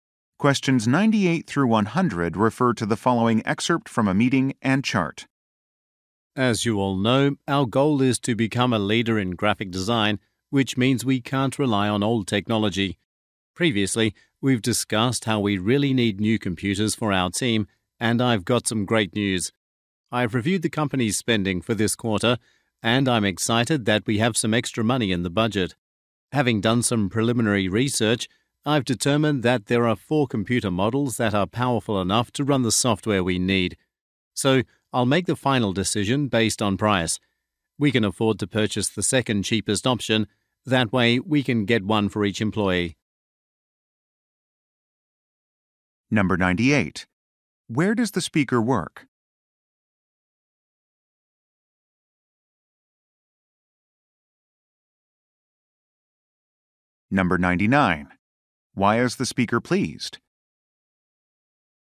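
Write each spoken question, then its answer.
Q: Where does the speaker work?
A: At a graphic design company

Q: Why is the speaker pleased?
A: There is extra money in the budget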